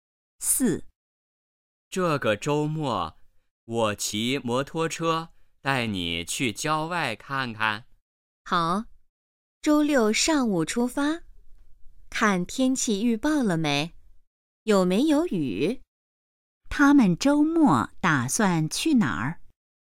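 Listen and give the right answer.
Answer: 郊外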